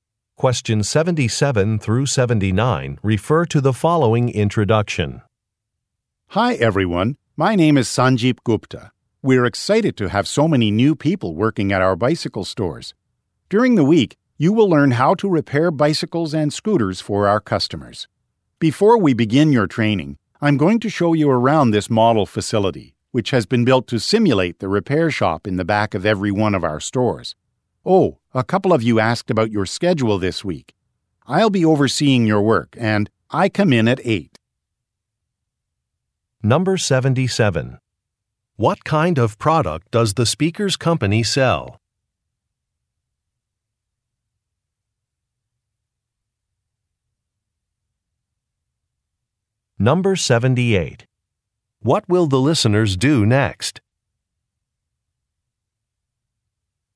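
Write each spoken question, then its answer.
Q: What kind of product does the speaker's company sell?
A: Bicycles (and scooters)

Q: What will the listeners do next?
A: Take a tour of the model facility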